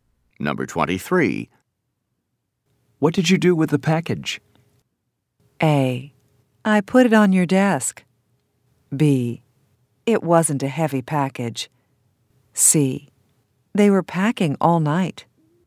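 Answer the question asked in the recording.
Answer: A: I put it on your desk.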